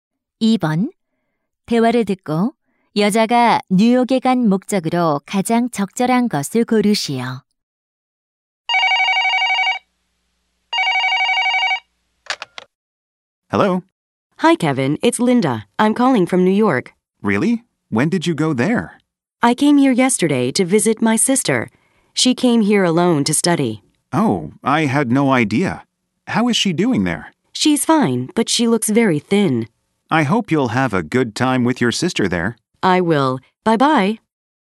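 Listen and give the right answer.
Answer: 여동생(언니)을 방문하기 위해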